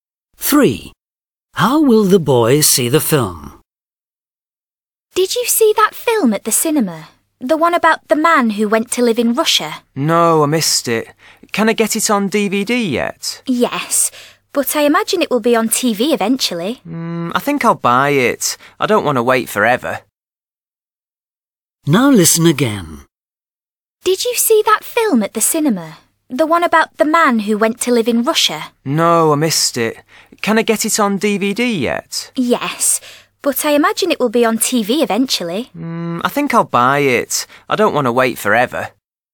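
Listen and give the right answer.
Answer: he'll buy it on DVD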